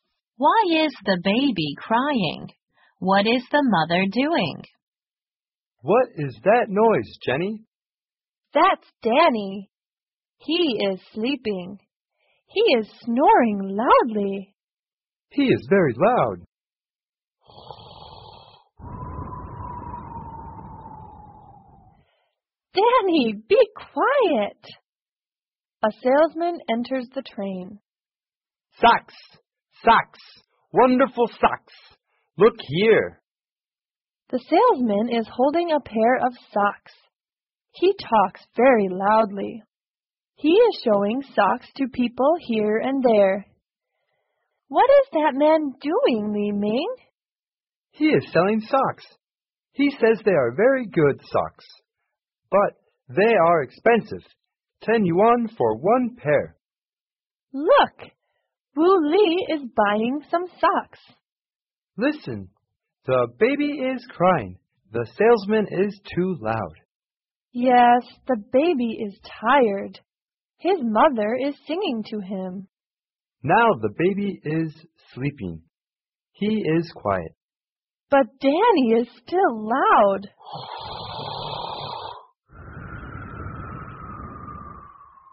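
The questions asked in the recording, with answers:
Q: Why is the baby crying?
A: Because the salesman is too loud.

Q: What is the mother doing?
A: She is singing to the baby.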